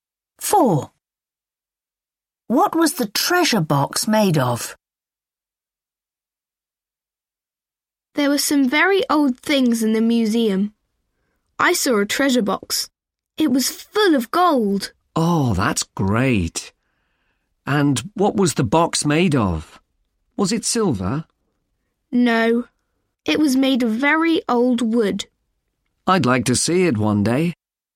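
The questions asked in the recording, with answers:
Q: What was the treasure box made of?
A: very old wood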